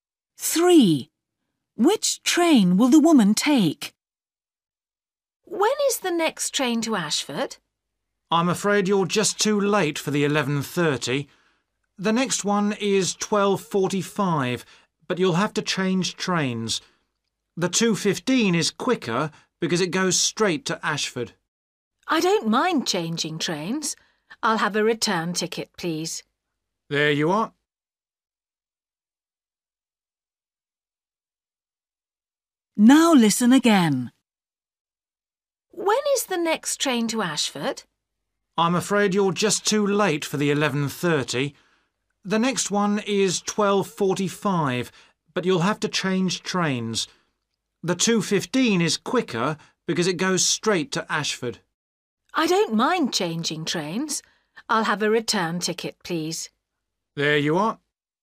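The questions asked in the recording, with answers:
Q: Which train will the woman take?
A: The 12:45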